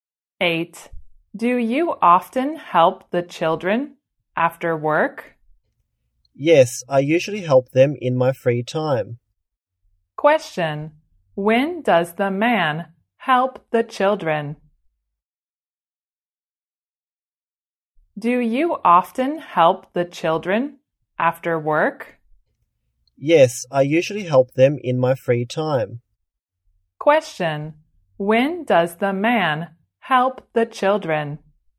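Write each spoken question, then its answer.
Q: when does the man help the children?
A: In his free time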